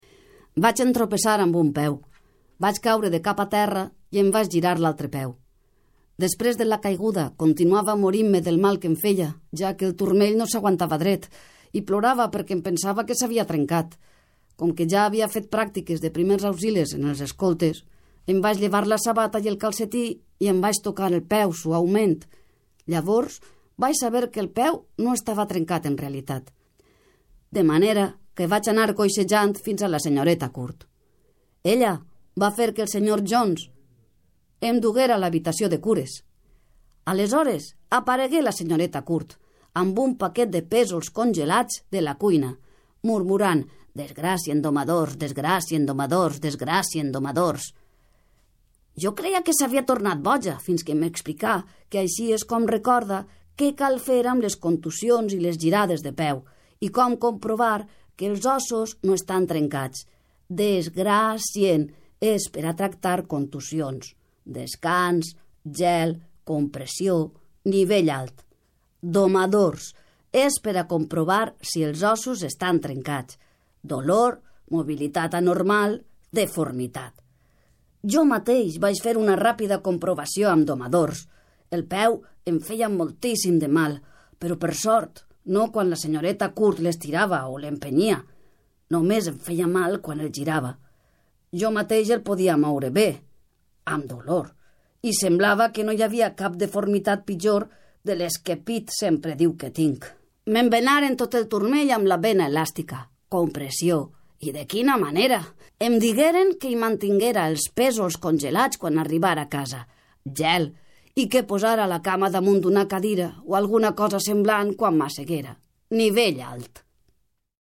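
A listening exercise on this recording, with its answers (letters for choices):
Completa els enunciats i selecciona l'opció adequada.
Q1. La protagonista va entropessar,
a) va caure a terra i es va girar un peu.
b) va caure damunt de la gespa i es va girar un peu.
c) va caure a terra i es va girar la mà.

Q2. La protagonista plorava...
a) perquè el turmell il feia mal, no s'aguantava dret, i pensava que es moriria.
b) perquè el turmell il feia mal, no s'aguantava dret, i pensava que s'havia trencat.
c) perquè el genoll il feia mal, no s'aguantava dret, ipensava que s'havia trencat.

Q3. La protagonista havia fet pràctiques de....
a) primers auxilis: se va tocar el cap per si tenia febra idesprés al part adolorida.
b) primers auxilis: es va llevar la sabata idesprés es va tocar la part adolorida.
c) primers auxilis: es va llevar la sabata, el calcetí i després es va tocar la part adolorida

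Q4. Per qué deia la senyoreta Court repetidament «DESGRACIEN DOMADORS»?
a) Perquè estava boja i no sabia com respondre a la situació.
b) Perquè era una tècnica per a recordar els passos que cal seguir en cas de tindre mal de ventre.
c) Perquè era una tècnica per a recordar els passos que cal seguir en cas de girades de peu.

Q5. Què significa «DOMADORS»?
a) Dolor, major, dorsal.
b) Dolor, mobilitat anormal, deformitat.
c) Dolor, mobilitat anormal, disconformitat.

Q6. Què li recomanen a la protagonista?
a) Que es pose pésols congelats damunt de al zona adolorida i que al mantinga en alt.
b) Que camine amb unes crosses ,i quan estiga a casa, mantinga al zona adolorida en alt.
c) Que acudisca a un fisioterapeuta.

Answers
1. a
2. b
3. c
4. c
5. b
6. a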